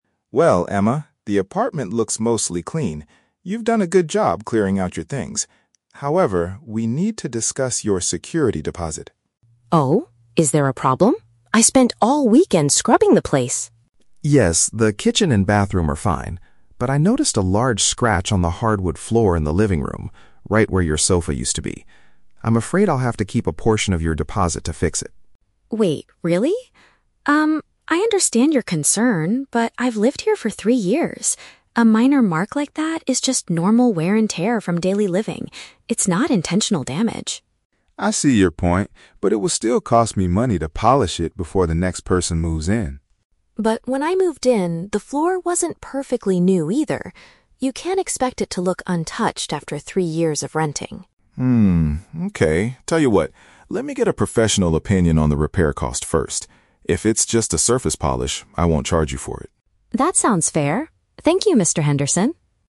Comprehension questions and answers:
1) Why does the landlord want to keep some of the deposit money?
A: There is a visible mark on the wooden floor.

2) How does the tenant defend herself regarding the issue?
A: She argues it is a natural result of living there for several years.

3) What is the final agreement between the two speakers?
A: The landlord will ask an expert about the price of fixing it.

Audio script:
Henderson: Well, Emma, the apartment looks mostly clean. You've done a good job clearing out your things. However, we need to discuss your security deposit.
Emma: Oh? Is there a problem? I spent all weekend scrubbing the place!
Henderson: Yes, the kitchen and bathroom are fine. But I noticed a large scratch on the hardwood floor in the living room, right where your sofa used to be. I'm afraid I'll have to keep a portion of your deposit to fix it.
Emma: Wait, really? Um, I understand your concern, but I've lived here for three years. A minor mark like that is just normal wear and tear from daily living. It's not intentional damage.
Henderson: I see your point, but it will still cost me money to polish it before the next person moves in.
Emma: But when I moved in, the floor wasn't perfectly new either. You can't expect it to look untouched after three years of renting.
Okay, tell you what. Let me get a professional opinion on the repair cost first. If it's just a surface polish, I won't charge you for it.